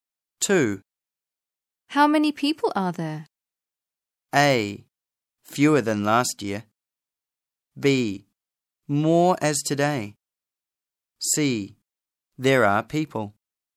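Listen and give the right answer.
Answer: A: Fewer than last year.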